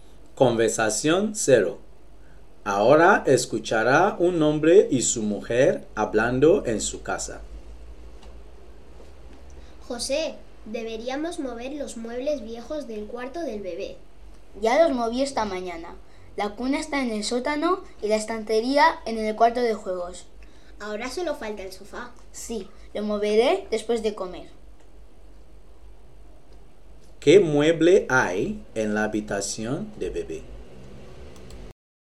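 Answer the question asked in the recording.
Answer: El sofá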